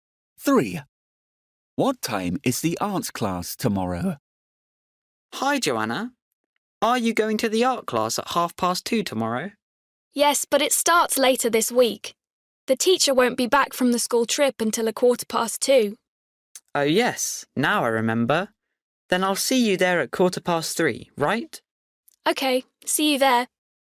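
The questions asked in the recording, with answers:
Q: What time is the art class tomorrow?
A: 3:15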